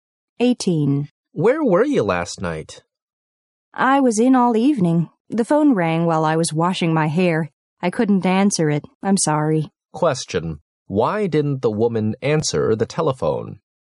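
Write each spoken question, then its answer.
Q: why didn't the woman answer the telephone?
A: She was washing her hair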